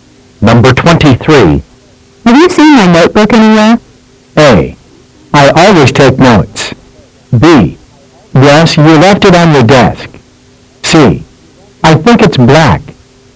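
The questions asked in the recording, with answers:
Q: Have you seen my notebook anywhere?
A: B: Yes, you left it on the desk.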